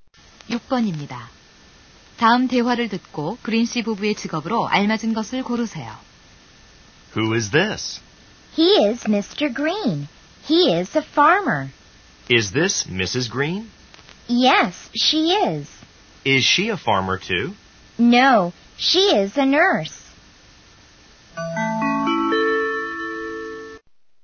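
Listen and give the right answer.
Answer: 남편은 농부, 부인은 간호사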